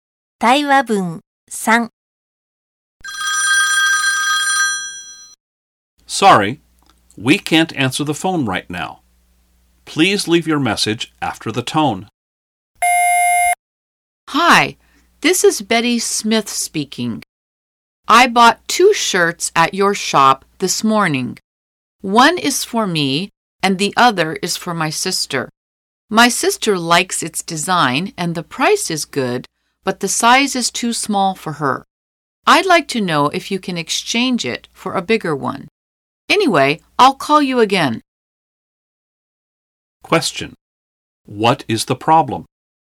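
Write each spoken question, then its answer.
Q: What is the problem?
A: The shirt for her sister is too small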